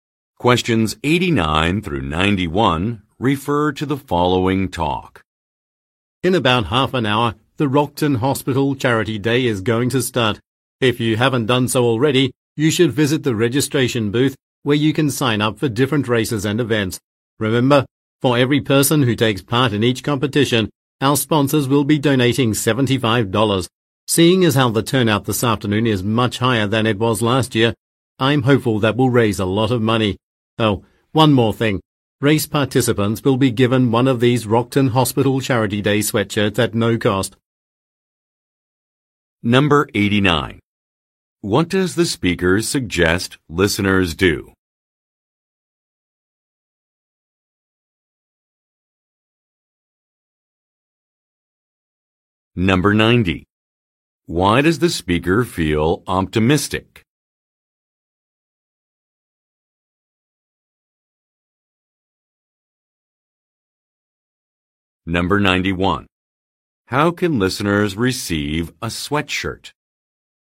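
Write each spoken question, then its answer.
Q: What does the speaker suggest listeners do?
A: Visit the registration booth to sign up for events

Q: Why does the speaker feel optimistic?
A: The turnout is much higher than last year

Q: How can listeners receive a sweatshirt?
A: By taking part in a race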